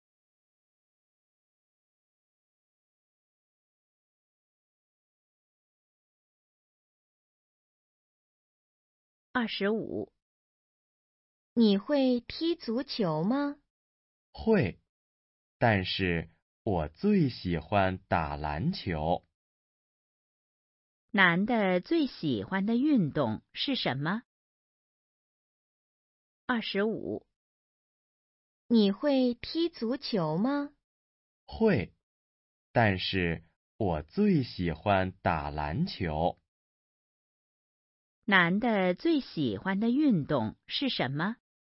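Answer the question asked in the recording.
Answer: 打篮球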